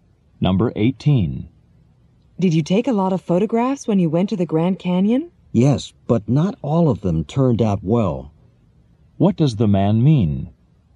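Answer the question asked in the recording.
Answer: Some of his photos came out badly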